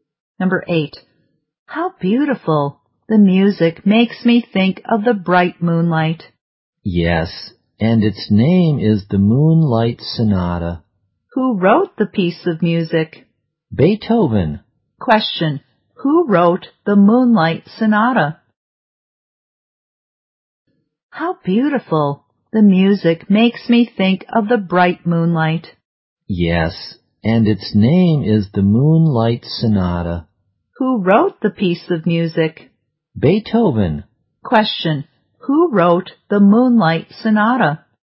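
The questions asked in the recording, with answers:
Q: Question. Who wrote the Moonlight Sonata?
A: Beethoven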